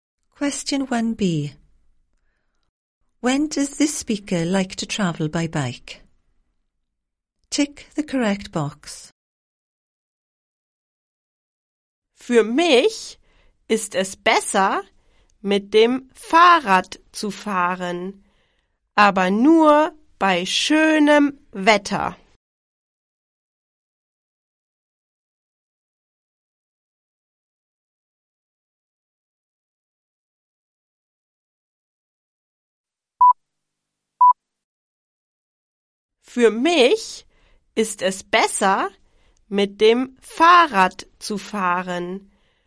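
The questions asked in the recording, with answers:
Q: When does this speaker like to travel by bike?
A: Only in nice weather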